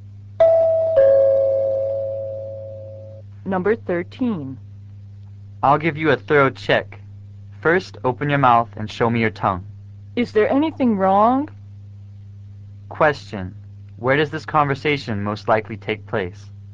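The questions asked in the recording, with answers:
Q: Where does this conversation most likely take place?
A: At a doctor's office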